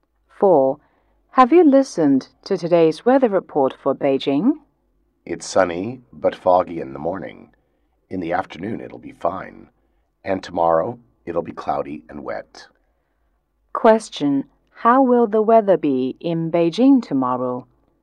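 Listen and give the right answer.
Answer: Cloudy and wet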